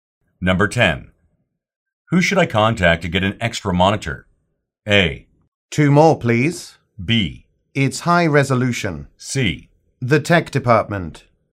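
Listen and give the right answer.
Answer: C: The tech department.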